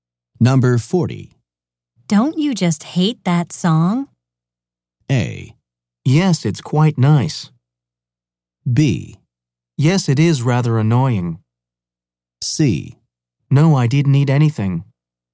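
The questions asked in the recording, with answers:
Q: Don't you just hate that song?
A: B: Yes, it is rather annoying.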